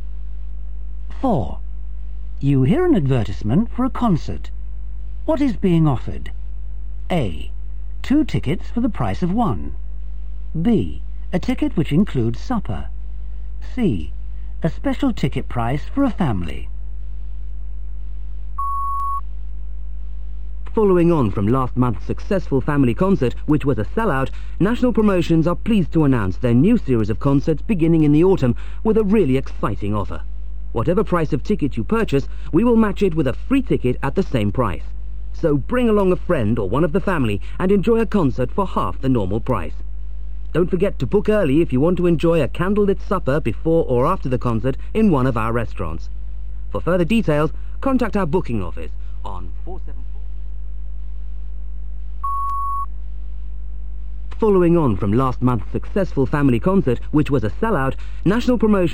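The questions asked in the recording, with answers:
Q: What is being offered?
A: A: 2 tickets for the price of 1.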